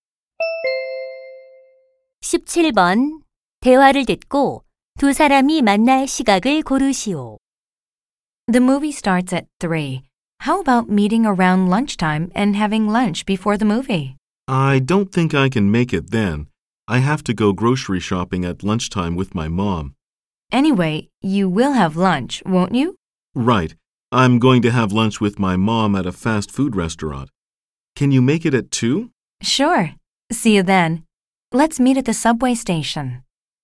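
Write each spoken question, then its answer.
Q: 대화를 듣고 두 사람이 만날 시각을 고르시오.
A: 2시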